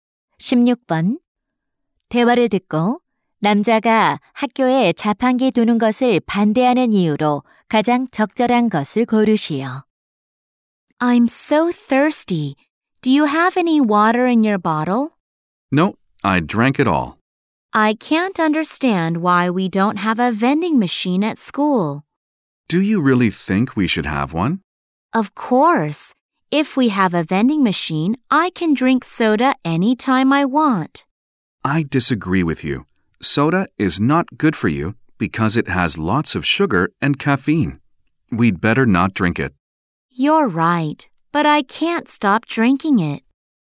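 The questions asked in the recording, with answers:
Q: 대화를 듣고 남자가 학교에 자판기 두는 것을 반대하는 이유로 가장 적절한 것을 고르시오.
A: 탄산음료에 설탕과 카페인이 많아 건강에 나빠서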